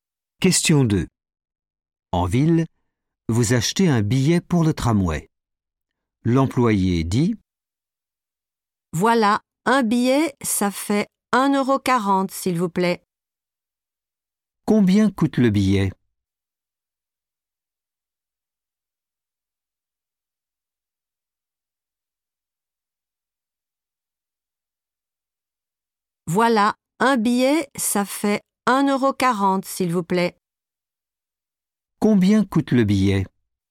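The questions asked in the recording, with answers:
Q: Combien coûte le billet ?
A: 1,40€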